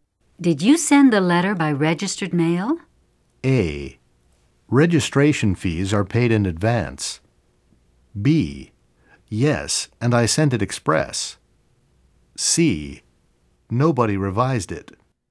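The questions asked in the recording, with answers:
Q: Did you send the letter by registered mail?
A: B: Yes, and I sent it express.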